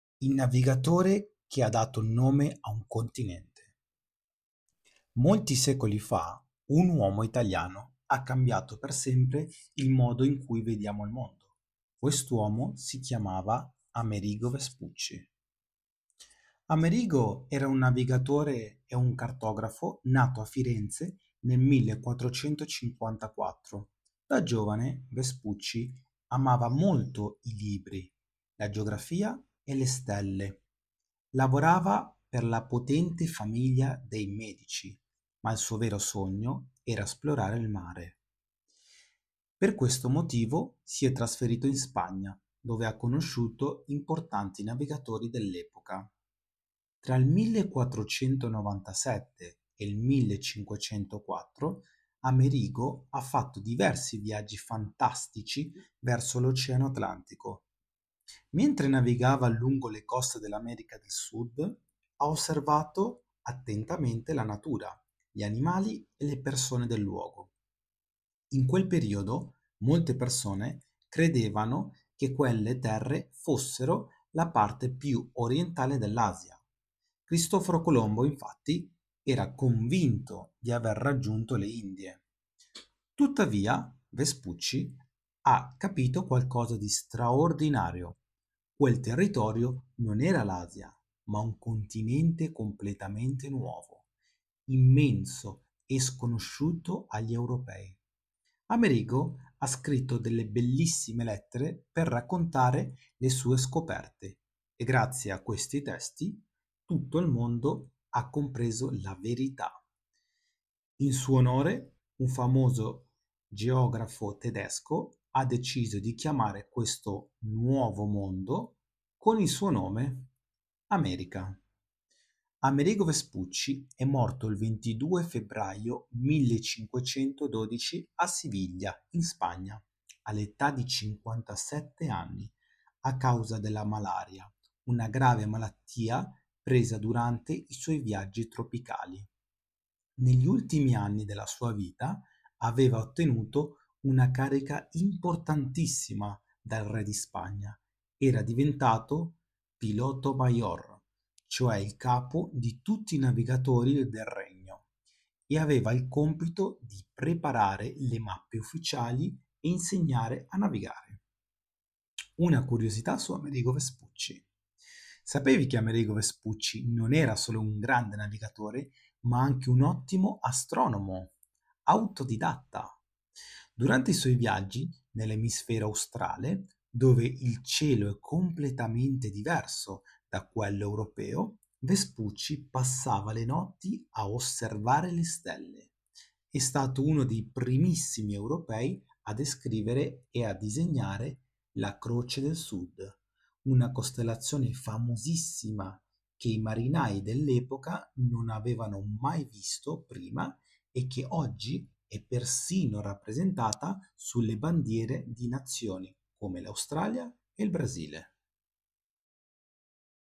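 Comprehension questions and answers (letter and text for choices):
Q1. Dove è nato Amerigo Vespucci nel 1454?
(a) A Siviglia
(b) A Firenze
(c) A Madrid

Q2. Per quale potente famiglia ha lavorato Vespucci quando era giovane?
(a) I Medici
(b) I Borbone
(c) I Savoia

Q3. Che cosa credeva Cristoforo Colombo riguardo alle terre che aveva raggiunto?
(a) Di aver scoperto un nuovo continente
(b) Di essere arrivato in Africa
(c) Di aver raggiunto le Indie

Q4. Quale importante intuizione ha avuto Amerigo Vespucci durante i suoi viaggi?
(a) Che quelle terre non erano l'Asia, ma un continente nuovo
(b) Che la Terra era piatta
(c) Che l'Asia era molto più vicina del previsto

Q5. Chi ha deciso di chiamare il "Nuovo Mondo" con il nome di "America"?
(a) Il re di Spagna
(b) Un famoso geografo tedesco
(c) Cristoforo Colombo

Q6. Quale importante carica ha ottenuto Vespucci negli ultimi anni della sua vita in Spagna?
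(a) Re di Siviglia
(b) Ambasciatore in Italia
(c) Piloto Mayor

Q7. A causa di quale malattia è morto Amerigo Vespucci nel 1512?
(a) La malaria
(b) Lo scorbuto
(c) La peste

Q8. Quale famosa costellazione dell'emisfero australe è stato uno dei primi a descrivere e disegnare?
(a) L'Orsa Maggiore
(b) La Croce del Sud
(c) La Stella Polare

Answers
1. (b) A Firenze
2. (a) I Medici
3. (c) Di aver raggiunto le Indie
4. (a) Che quelle terre non erano l'Asia, ma un continente nuovo
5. (b) Un famoso geografo tedesco
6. (c) Piloto Mayor
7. (a) La malaria
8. (b) La Croce del Sud

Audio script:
Il navigatore che ha dato il nome a un continente
Molti secoli fa', un uomo italiano ha cambiato per sempre il modo in cui vediamo il mondo. Quest'uomo si chiamava Amerigo Vespucci.
Amerigo era un navigatore e un cartografo nato a Firenze nel 1454. Da giovane, Vespucci amava molto i libri, la geografia e le stelle. 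Lavorava per la potente famiglia dei Medici, ma il suo vero sogno era esplorare il mare. Per questo motivo, si è trasferito in Spagna, dove ha conosciuto importanti navigatori dell'epoca.
Tra il 1497 e il 1504, Amerigo ha fatto diversi viaggi fantastici verso l'oceano Atlantico. Mentre navigava lungo le coste dell'America del Sud, ha osservato attentamente la natura, gli animali e le persone del luogo. In quel periodo, molte persone credevano che quelle terre fossero la parte più orientale dell'Asia. Cristoforo Colombo, infatti, era convinto di aver raggiunto le Indie.
Tuttavia, Vespucci ha capito qualcosa di straordinario: quel territorio non era l'Asia, ma un continente completamente nuovo, immenso e sconosciuto agli europei. Amerigo ha scritto delle bellissime lettere per raccontare le sue scoperte e, grazie a questi testi, tutto il mondo ha compreso la verità.
In suo onore, un famoso geografo tedesco ha deciso di chiamare questo "Nuovo Mondo" con il suo nome: America.
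Amerigo Vespucci e' morto il 22 febbraio 1512 a Siviglia, in Spagna, all'età di 57 anni a causa della malaria, una grave malattia presa durante i suoi viaggi tropicali. Negli ultimi anni della sua vita, aveva ottenuto una carica importantissima dal re di Spagna: era diventato "Piloto Mayor", cioè il capo di tutti i navigatori del regno, e aveva il compito di preparare le mappe ufficiali e insegnare a navigare.
Una curiosità su Amerigo Vespucci
Sapevi che Amerigo Vespucci non era solo un grande navigatore, ma anche un ottimo "astronomo" autodidatta.
Durante i suoi viaggi nell'emisfero australe, dove il cielo è completamente diverso da quello europeo, Vespucci passava le notti a osservare le stelle. È stato uno dei primissimi europei a descrivere e a disegnare la Croce del Sud, una costellazione famosissima che i marinai dell'epoca non avevano mai visto prima e che oggi è persino rappresentata sulle bandiere di nazioni come l'Australia e il Brasile!
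Amerigo Vespucci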